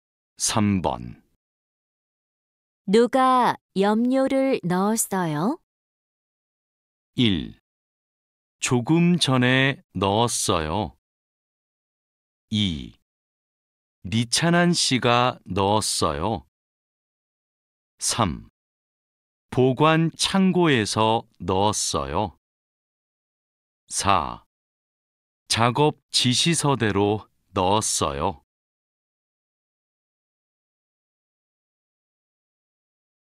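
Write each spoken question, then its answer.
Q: 누가 염료를 넣었어요?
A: 2: 리찬한 씨가 넣었어요.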